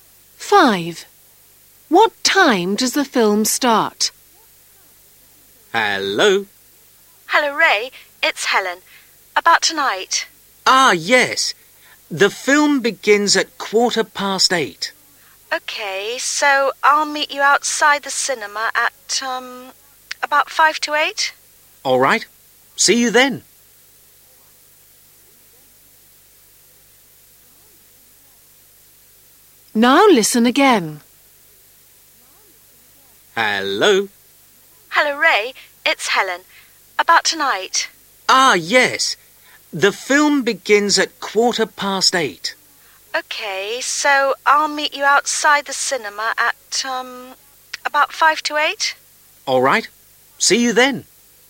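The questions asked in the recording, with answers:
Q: What time does the film start?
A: 8:15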